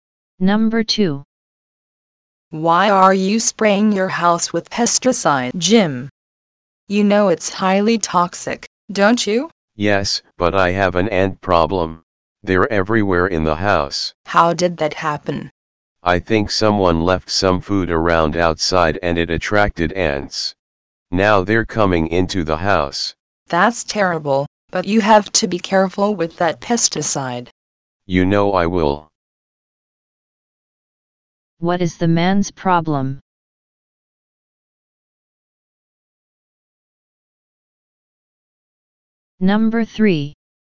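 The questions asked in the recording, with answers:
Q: What is the man's problem?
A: There are ants everywhere in his house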